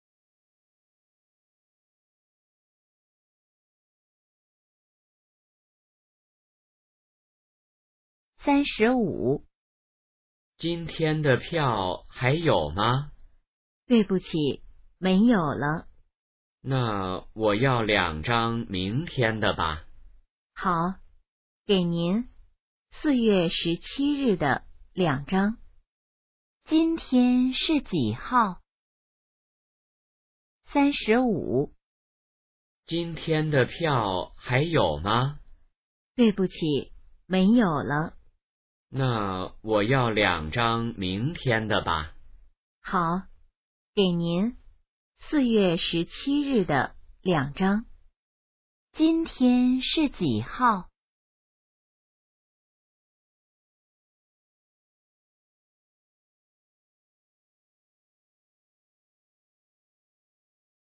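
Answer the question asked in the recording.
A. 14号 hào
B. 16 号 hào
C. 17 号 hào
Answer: B. 16 号 hào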